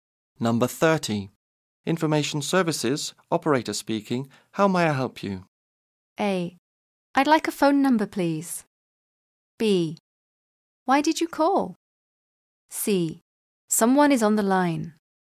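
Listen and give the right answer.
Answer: A: I'd like a phone number, please.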